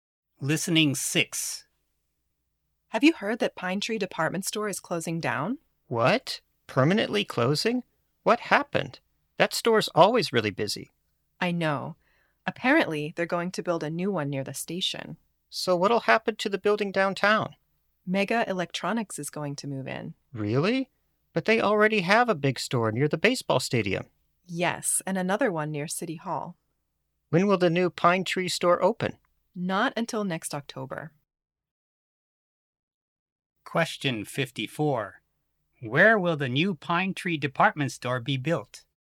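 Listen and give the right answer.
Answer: Near the station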